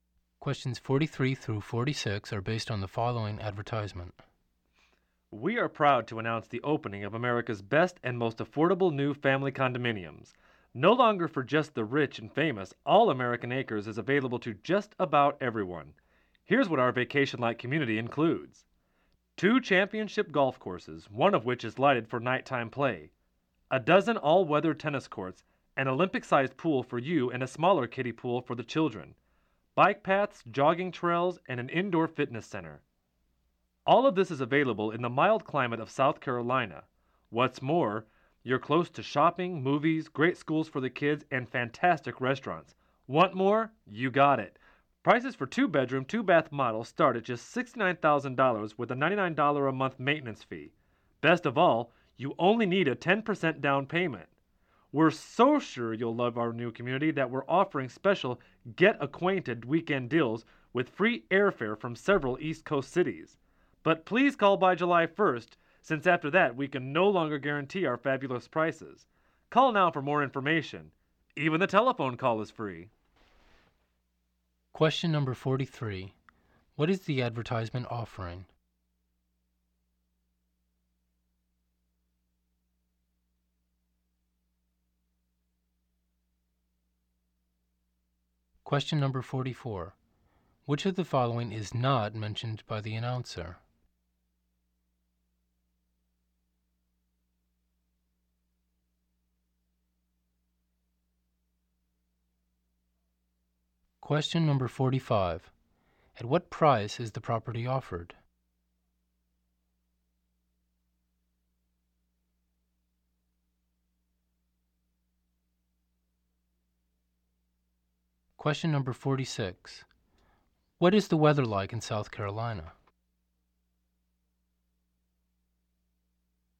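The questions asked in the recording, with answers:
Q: What is the advertisement offering?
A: New family condominiums

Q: At what price is the property offered?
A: Starting at $69,000

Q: What is the weather like in South Carolina?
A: Mild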